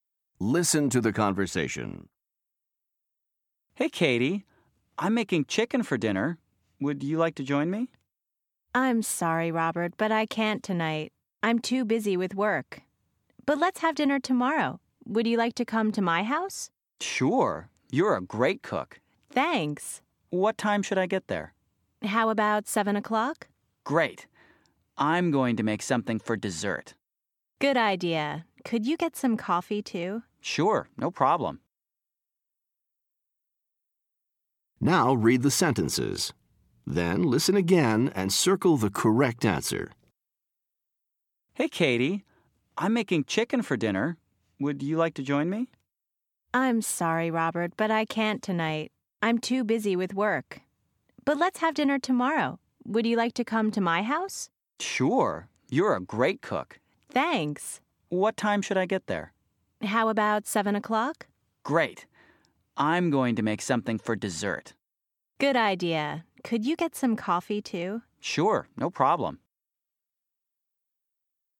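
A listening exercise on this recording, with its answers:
Listen to the conversation. Then listen again and choose the correct word or phrase to complete each sentence.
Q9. Katie can't ............ to dinner tonight.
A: come

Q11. Katie ............ well.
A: cooks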